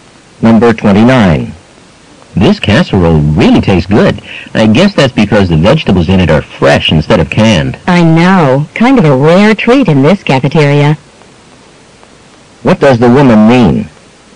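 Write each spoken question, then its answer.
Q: What does the woman mean?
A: The cafeteria rarely uses fresh vegetables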